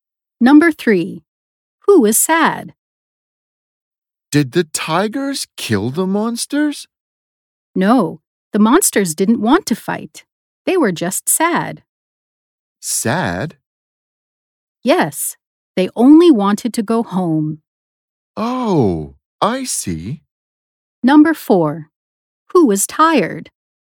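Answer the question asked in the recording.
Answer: The monsters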